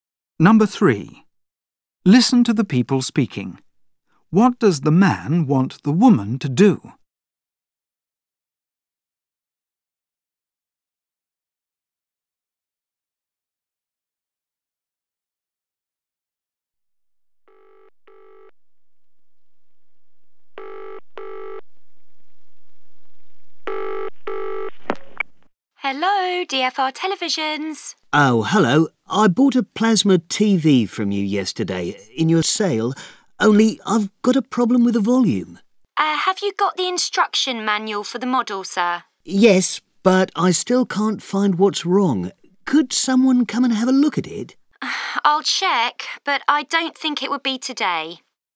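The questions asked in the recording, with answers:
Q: What does the man want the woman to do?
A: Send someone to look at his TV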